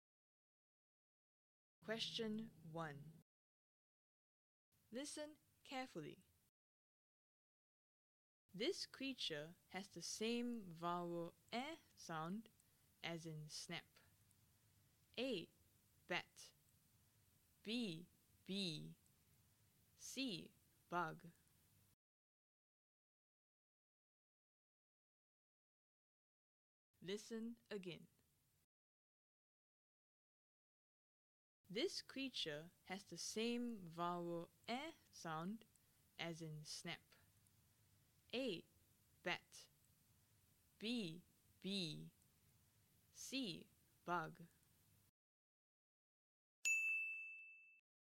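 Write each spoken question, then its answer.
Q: This creature has the same vowel eh sound as in snap.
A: A: Bat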